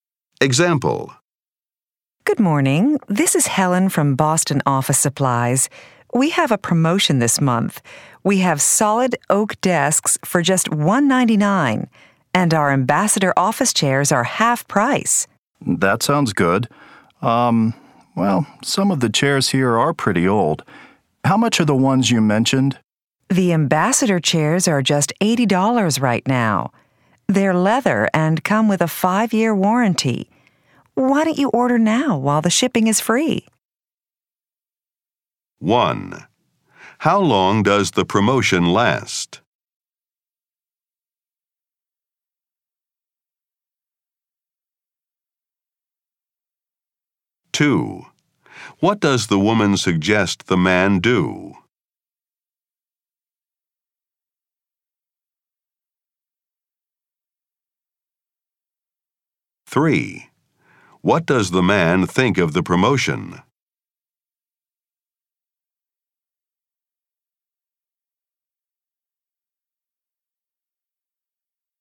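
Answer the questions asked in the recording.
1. This month
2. Order now while shipping is free
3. It sounds good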